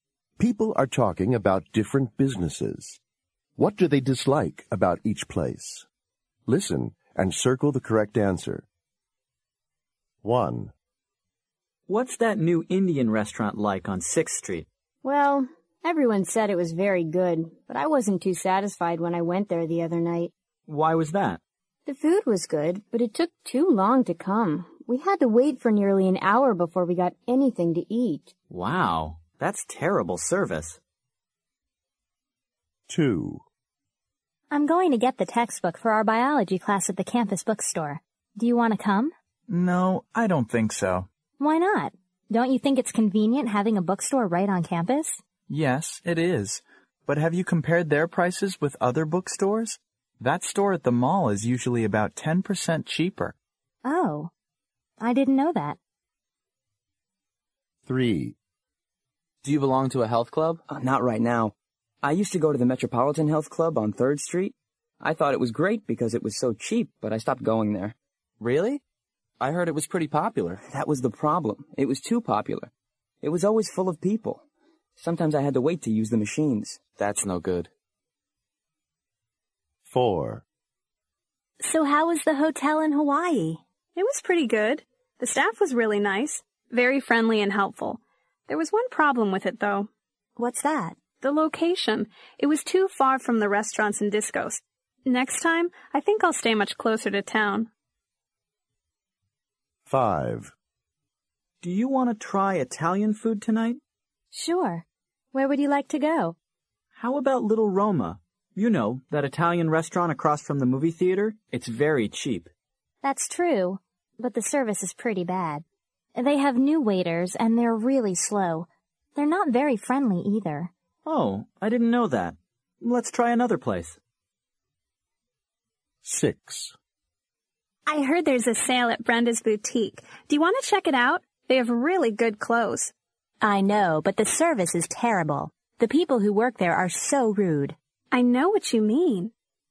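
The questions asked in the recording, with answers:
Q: What do they dislike about each place?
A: The service is too slow; the food took too long to come

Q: What do they dislike about each place?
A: The prices; it's more expensive than other bookstores

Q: What do they dislike about each place?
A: It was too crowded

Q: What do they dislike about each place?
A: The location; it was too far from town

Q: What do they dislike about each place?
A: The service; the waiters are slow and unfriendly

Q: What do they dislike about each place?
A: The service; the staff are rude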